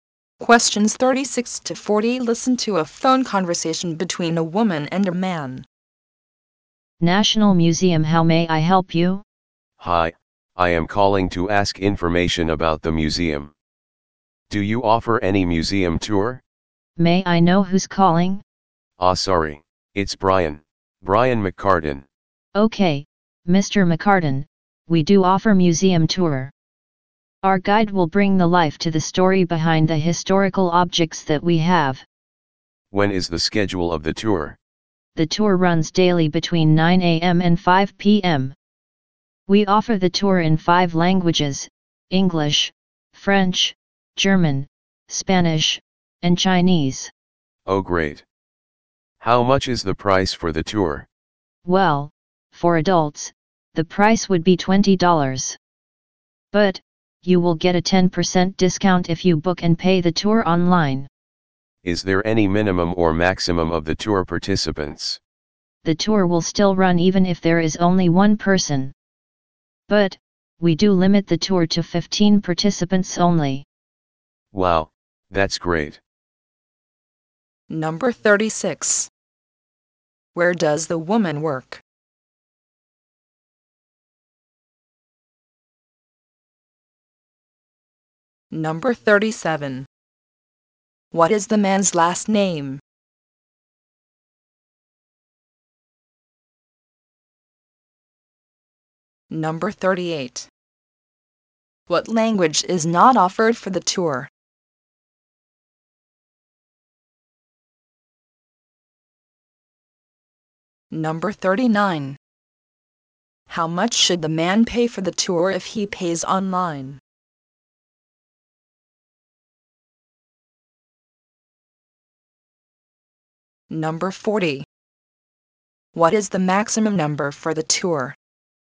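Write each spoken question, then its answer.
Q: Where does the woman work?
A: At the National Museum

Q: What is the man's last name?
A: McCartan

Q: How much should the man pay for the tour if he pays online?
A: $18

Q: What is the maximum number for the tour?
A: 15 participants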